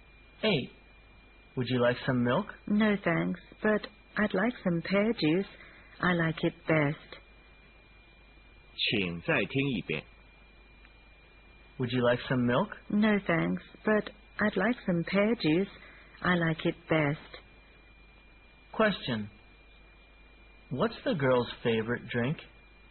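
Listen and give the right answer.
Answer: Pear juice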